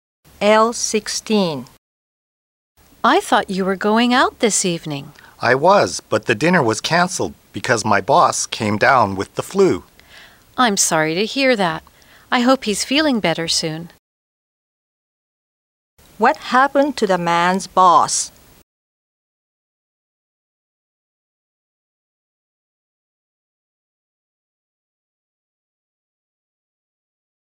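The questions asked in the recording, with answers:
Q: What happened to the man's boss?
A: He got the flu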